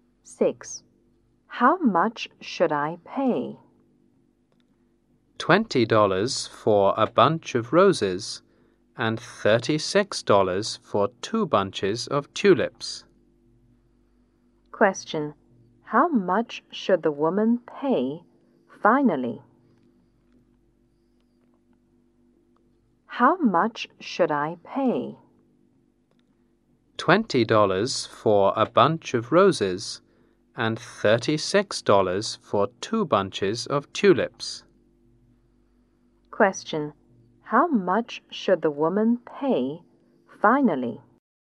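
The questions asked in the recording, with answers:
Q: How much should the woman pay finally?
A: $56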